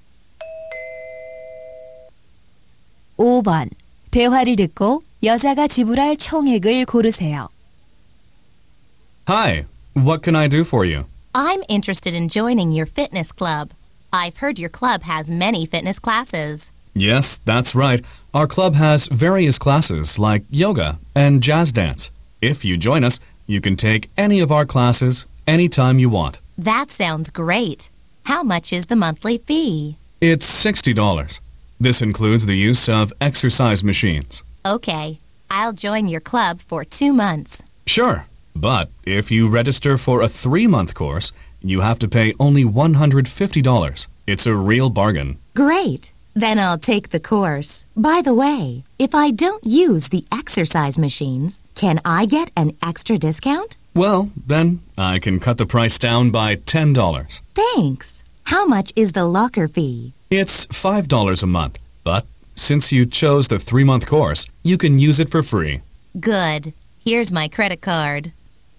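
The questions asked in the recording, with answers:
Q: 대화를 듣고 여자가 지불할 총액을 고르세요.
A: $140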